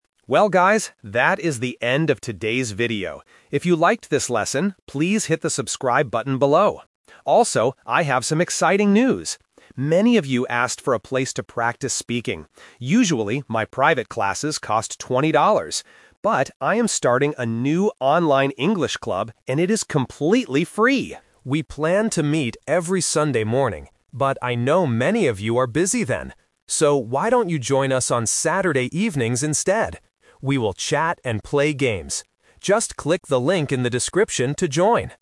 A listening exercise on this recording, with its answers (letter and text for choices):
Listen to the vlogger and choose the correct answer (A, B, or C).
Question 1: What does the vlogger ask the viewers to do first?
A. Hit the subscribe button.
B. Pay twenty dollars.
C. Write a comment below.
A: A. Hit the subscribe button.

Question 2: How much does it cost to join the new online English club?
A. Twenty dollars.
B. It is completely free.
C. Ten dollars.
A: B. It is completely free.

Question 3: When is the English club going to meet?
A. Sunday morning.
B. Sunday evening.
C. Saturday evening.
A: C. Saturday evening.

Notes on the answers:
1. The vlogger says, "If you liked this lesson, please hit the subscribe button below." Option B is the Trap (twenty dollars is for private classes, not the first action requested). Option C is a plausible action on YouTube but is not mentioned.
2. The vlogger clearly states, "...I am starting a new online English club, and it is completely free!" Option A is the Trap (twenty dollars is the price for his usual private classes, not the new club). Option C is not mentioned.
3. This is The Twist. The vlogger says they planned to meet on Sunday morning, but changes it: "So, why don't you join us on Saturday evenings instead?". Option A is the Trap (the original plan that was rejected). Option B is not mentioned.

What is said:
Vlogger: Well, guys, that is the end of today's video. If you liked this lesson, please hit the subscribe button below. Also, I have some exciting news! Many of you asked for a place to practice speaking. Usually, my private classes cost twenty dollars. But, I am starting a new online English club, and it is completely free! We planned to meet every Sunday morning, but I know many of you are busy then. So, why don't you join us on Saturday evenings instead?

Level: A2